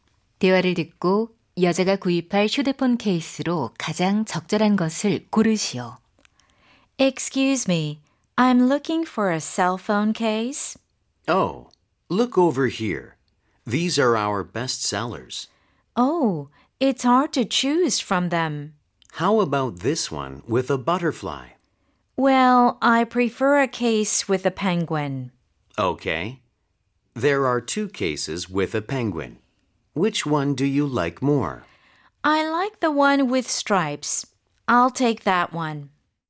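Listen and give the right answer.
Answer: 줄무늬가 있는 펭귄 케이스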